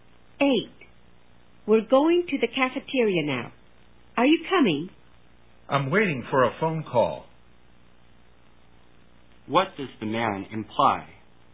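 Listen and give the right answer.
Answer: He can't go to the cafeteria now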